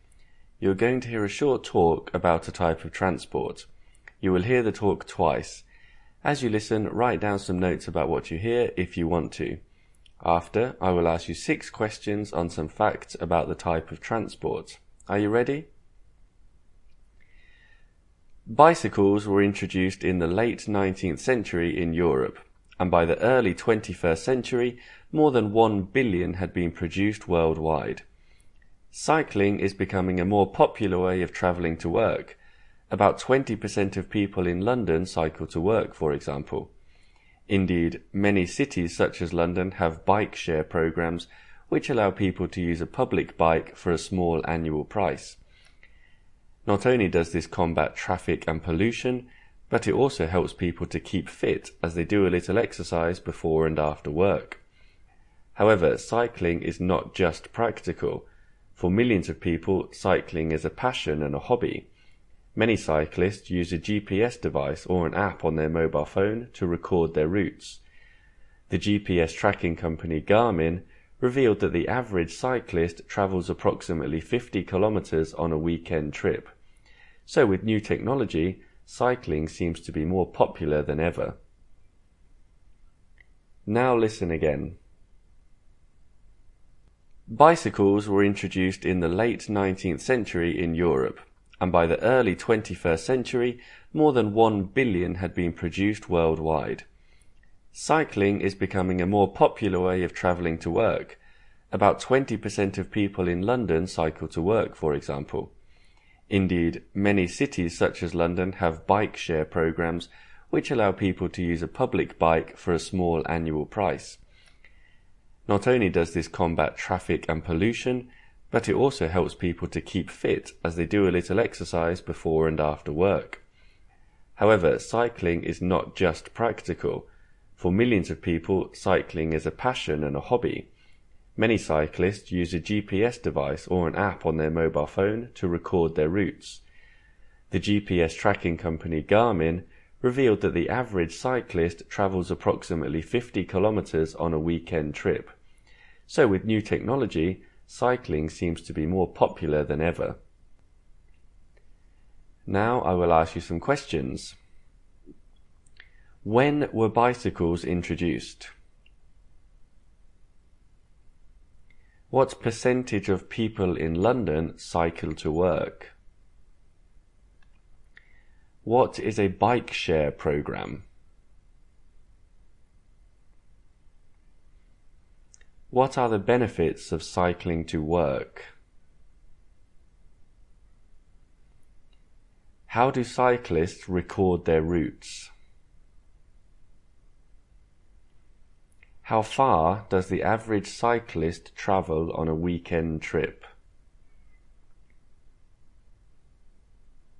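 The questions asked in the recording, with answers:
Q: When were bicycles introduced?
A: In the late 19th century

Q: What percentage of people in London cycle to work?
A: About 20%

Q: What is a bike share program?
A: A programme that lets people use a public bike for a small annual price

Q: What are the benefits of cycling to work?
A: It fights traffic and pollution and helps people keep fit

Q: How do cyclists record their routes?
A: With a GPS device or a mobile phone app

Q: How far does the average cyclist travel on a weekend trip?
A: About 50 kilometres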